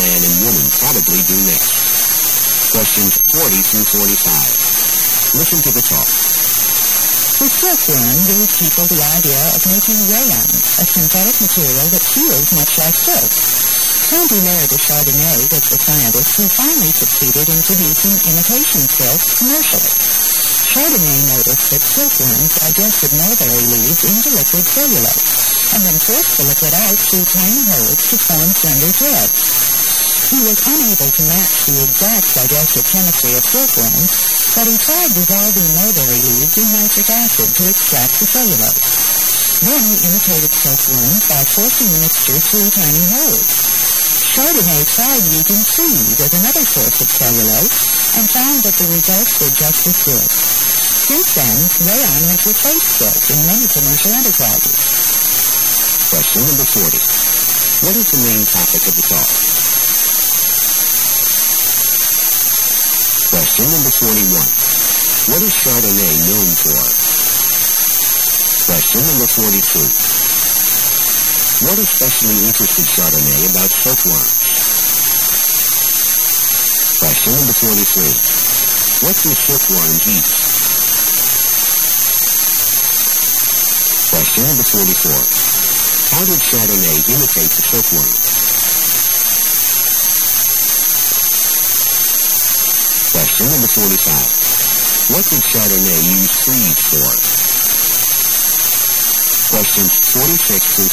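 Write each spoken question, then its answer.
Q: What is the main topic of the talk?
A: How rayon (imitation silk) was developed

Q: What is Chardonnay known for?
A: Producing imitation silk commercially

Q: What especially interested Chardonnay about silkworms?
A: How they turn mulberry leaves into liquid cellulose and force it out as threads

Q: What do silkworms eat?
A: Mulberry leaves

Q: How did Chardonnay imitate the silkworm?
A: He forced the dissolved cellulose mixture through tiny holes

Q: What did Chardonnay use trees for?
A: As another source of cellulose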